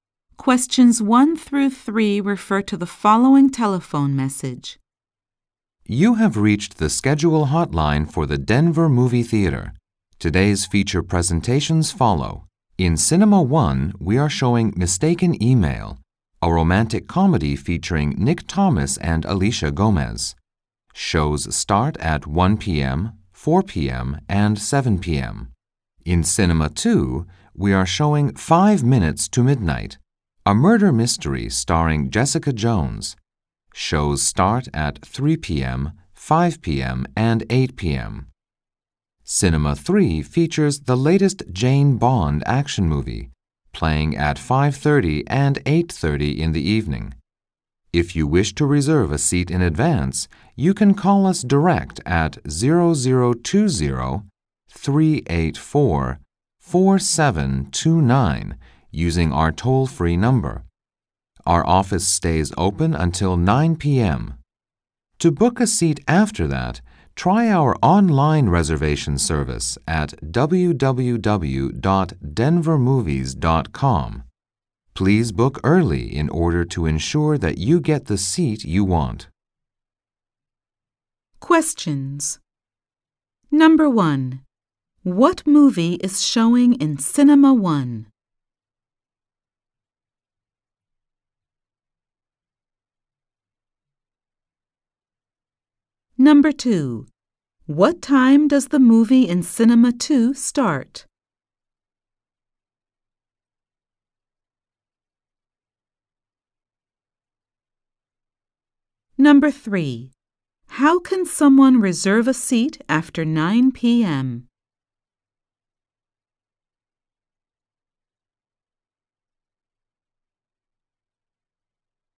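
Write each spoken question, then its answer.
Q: What movie is showing in Cinema 1?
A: Mistaken Email

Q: How can someone reserve a seat after 9 p.m.?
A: Online at www.denvermovies.com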